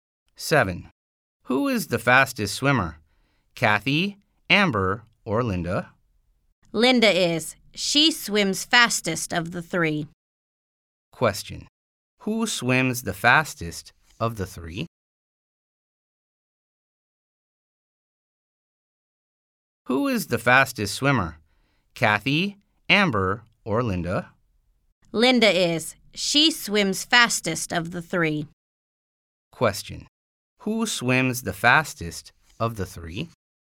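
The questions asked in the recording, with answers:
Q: Who swims the fastest of the three?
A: Linda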